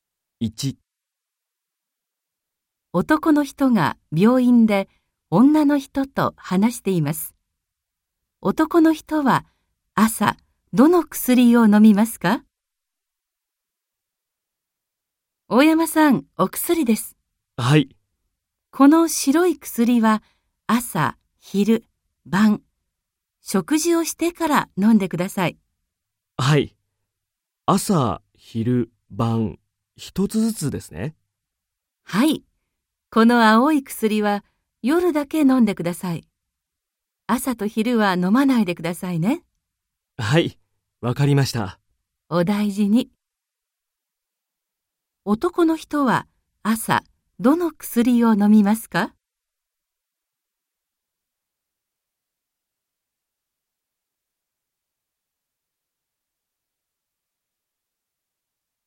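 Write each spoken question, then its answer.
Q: 男の人は朝どの薬を飲みますか?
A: 白い薬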